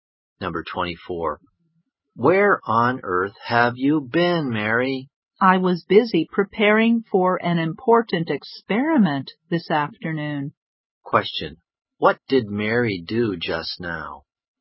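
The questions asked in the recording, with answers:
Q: What did Mary do just now?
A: She prepared for an important experiment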